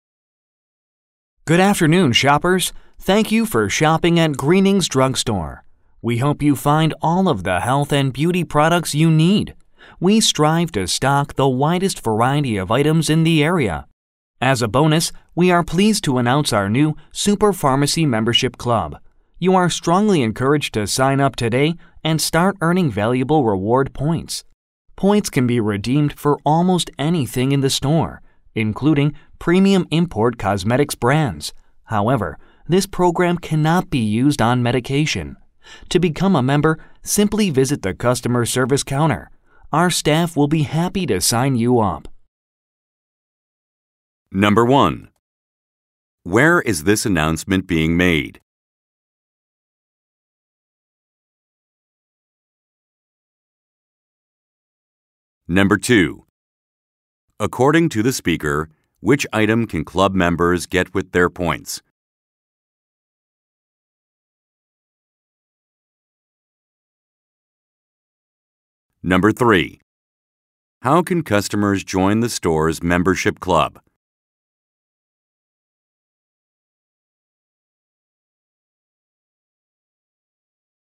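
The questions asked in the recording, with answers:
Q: Where is this announcement being made?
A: At a drugstore (Greening's Drugstore)

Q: According to the speaker, which item can club members get with their points?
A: Cosmetics (premium import cosmetics brands)

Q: How can customers join the store's membership club?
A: By visiting the customer service counter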